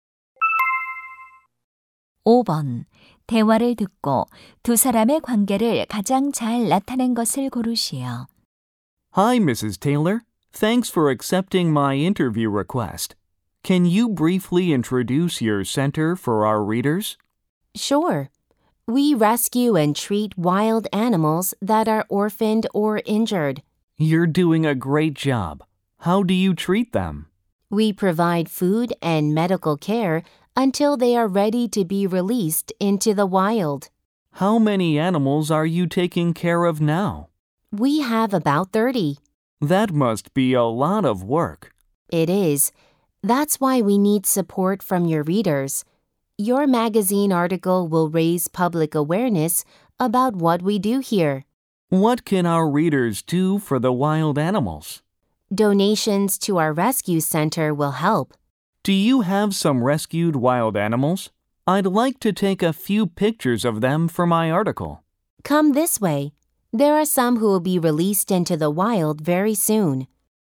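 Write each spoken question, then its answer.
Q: 대화를 듣고 두 사람의 관계를 가장 잘 나타낸 것을 고르시오.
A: 잡지 기자 - 야생동물 구조센터 운영자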